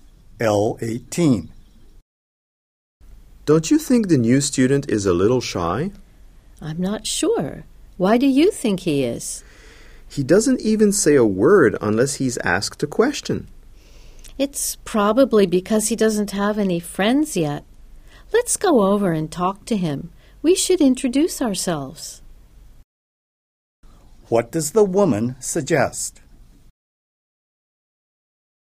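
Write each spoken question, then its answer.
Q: What does the woman suggest?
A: Going over to talk to the new student and introducing themselves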